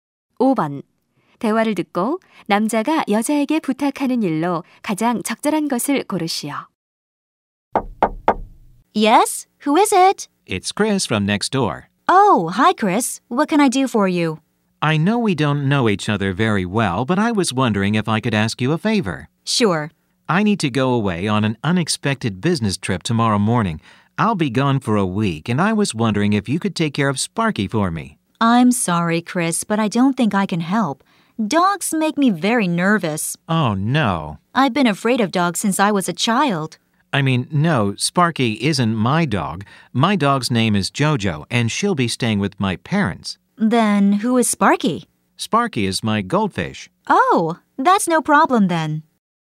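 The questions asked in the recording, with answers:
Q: 대화를 듣고 남자가 여자에게 부탁하는 일로 가장 적절한 것을 고르시오.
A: 출장 동안 금붕어 돌봐 주기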